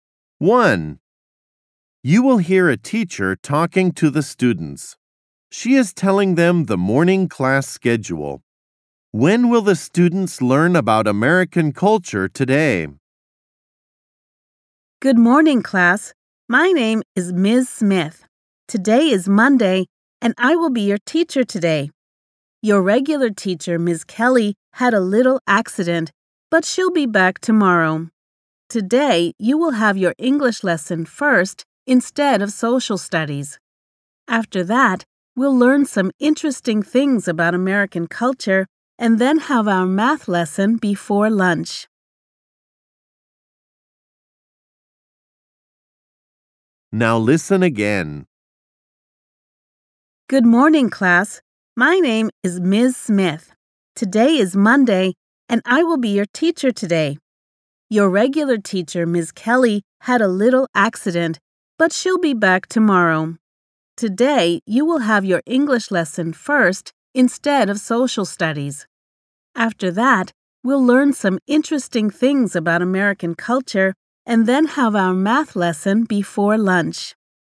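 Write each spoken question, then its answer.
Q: When will the students learn about American culture today?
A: After the English lesson, before the math lesson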